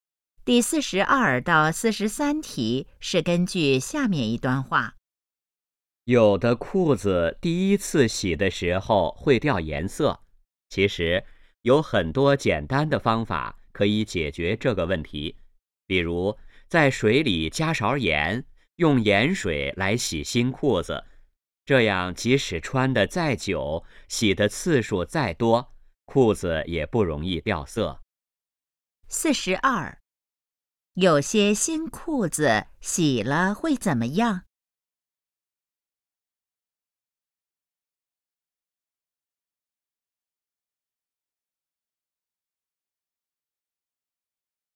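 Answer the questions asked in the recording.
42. 掉颜色
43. 用盐水洗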